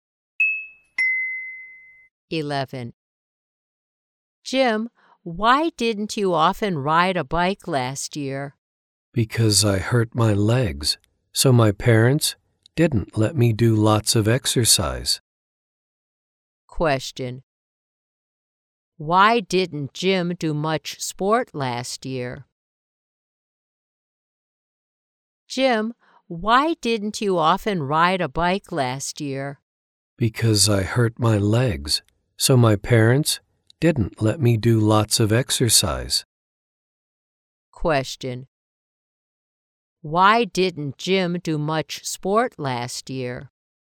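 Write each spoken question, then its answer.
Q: Why didn't Jim do much sport last year?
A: Because he hurt his legs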